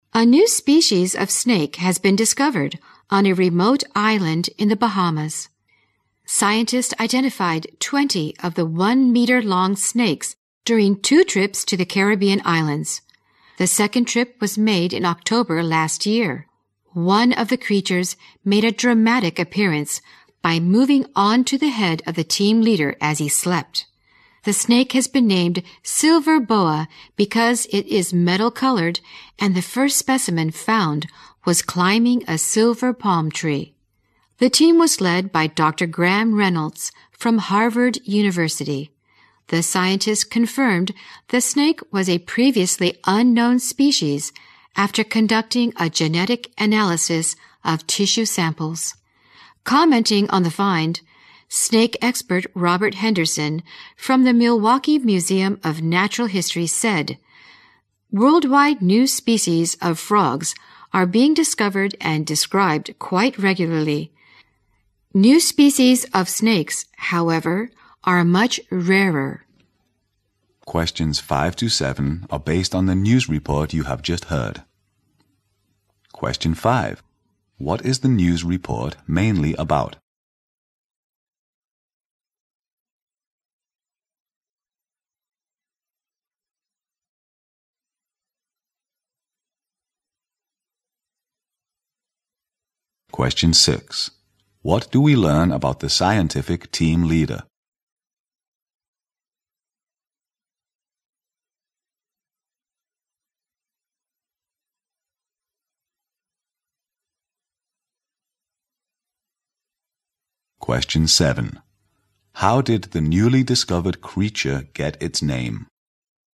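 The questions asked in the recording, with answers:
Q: What is the news report mainly about?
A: The discovery of a new species of snake in the Bahamas

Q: What do we learn about the scientific team leader?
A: A snake moved on to his head while he slept

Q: How did the newly discovered creature get its name?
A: It is metal-colored and the first one was found climbing a silver palm tree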